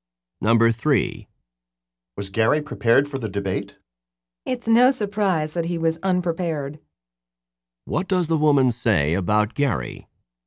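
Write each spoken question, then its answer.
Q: What does the woman say about Gary?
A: He was unprepared, as expected.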